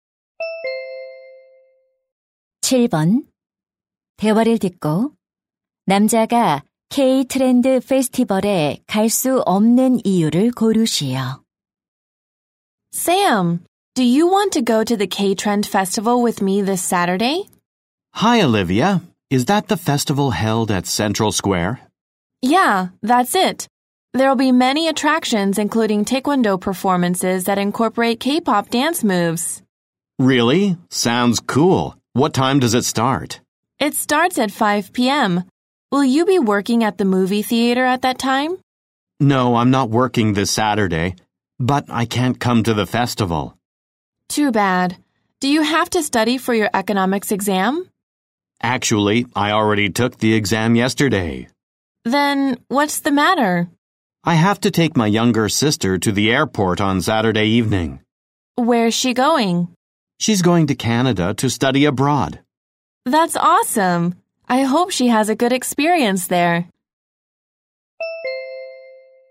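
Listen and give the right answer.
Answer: 여동생을 공항에 데려다줘야 해서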